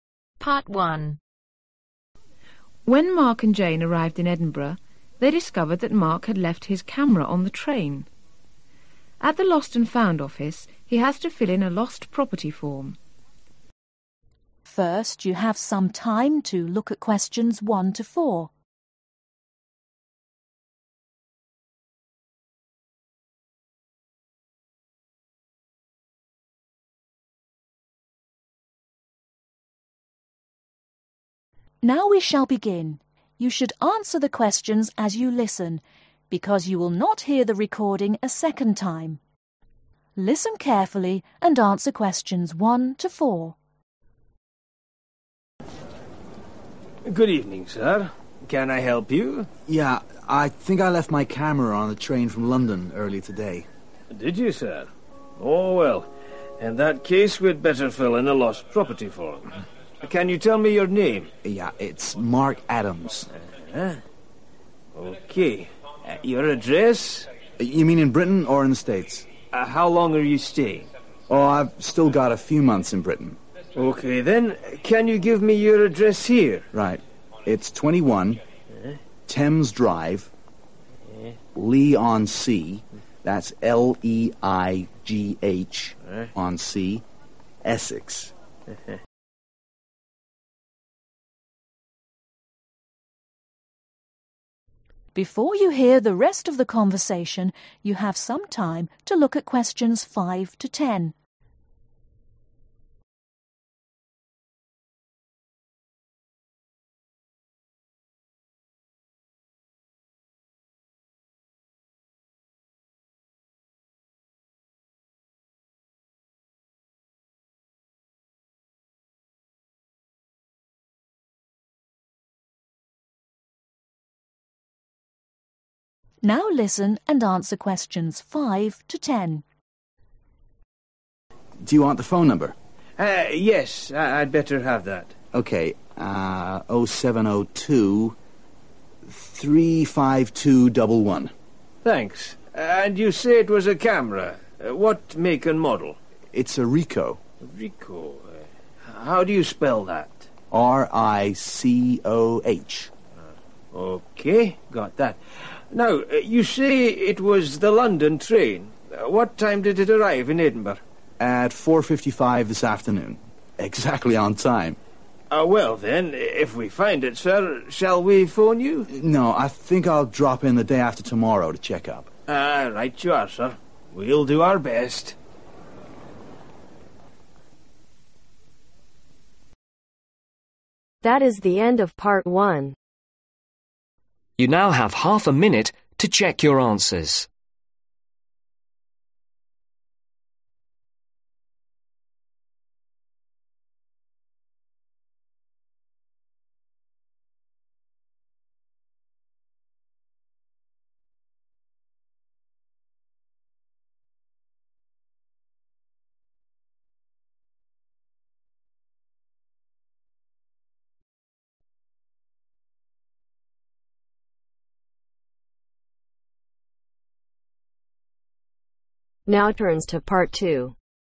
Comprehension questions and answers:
Complete the notes below. Write ONE WORD OR A NUMBER for each answer.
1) First name (s) : (1)............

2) Surname : (2)............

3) Address : (3)............ Thames drive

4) (4)............ on sea ESSEX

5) Telephone : 0702 (5)............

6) Item lost : (6)............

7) Description : (7)............ KA 10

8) Train : (8)............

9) Time of arrival : (9)............ pm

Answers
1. Mark
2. Adams
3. 21
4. Leigh
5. 35211
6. Camera
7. Ricoh
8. London
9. 4.55